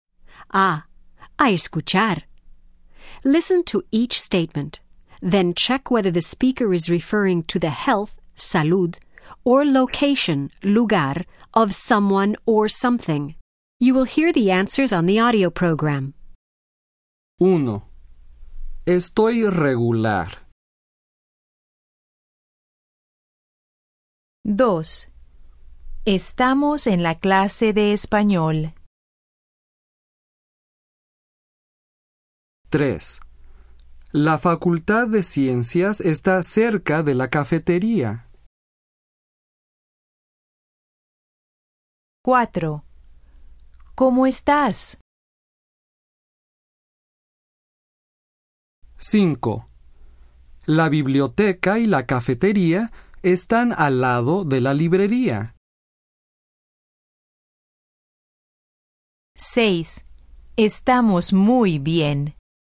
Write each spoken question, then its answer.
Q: Estoy regular.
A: Salud.

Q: Estamos en la clase de español.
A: Lugar.

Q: La Facultad de Ciencias está cerca de la cafetería.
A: Lugar.

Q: ¿Cómo estás?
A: Salud.

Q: La biblioteca y la cafetería están al lado de la librería.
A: Lugar.

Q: Estamos muy bien.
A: Salud.